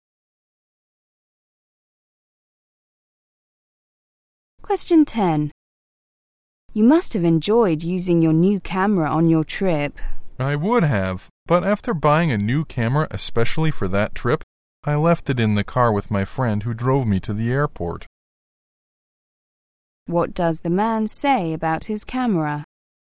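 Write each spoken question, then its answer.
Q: What does the man say about his camera?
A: He left it in his friend's car and couldn't use it on the trip.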